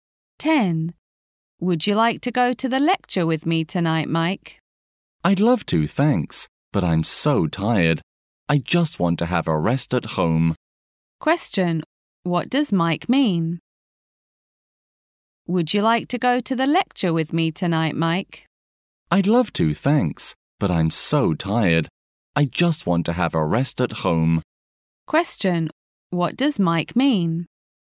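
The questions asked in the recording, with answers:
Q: What does Mike mean?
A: He won't go to the lecture; he wants to rest at home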